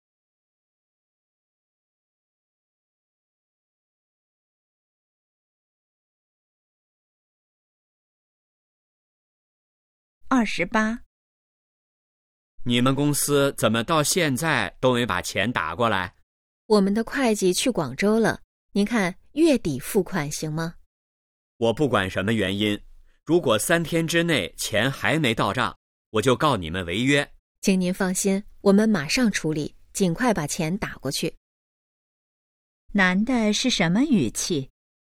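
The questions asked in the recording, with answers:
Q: 男的是什么语气?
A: 生气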